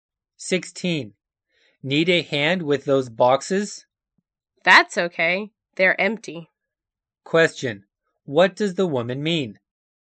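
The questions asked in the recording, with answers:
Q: What does the woman mean?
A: She doesn't need help because the boxes are light.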